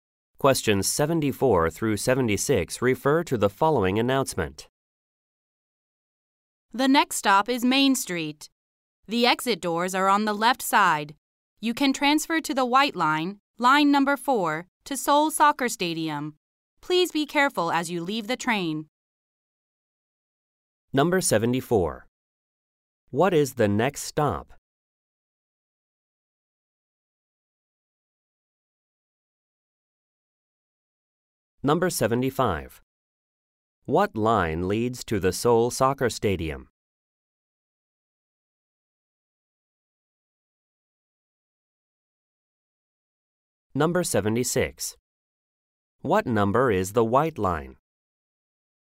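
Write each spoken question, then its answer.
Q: What is the next stop?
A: Main Street

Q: What line leads to the Seoul Soccer Stadium?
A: The white line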